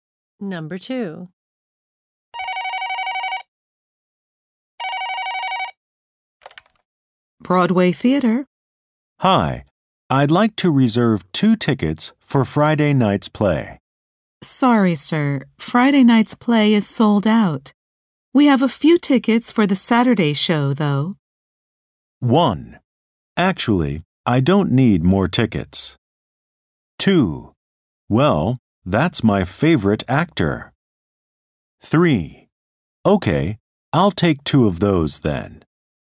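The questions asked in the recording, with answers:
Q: We have a few tickets for the Saturday show, though.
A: 3: Okay, I'll take 2 of those then.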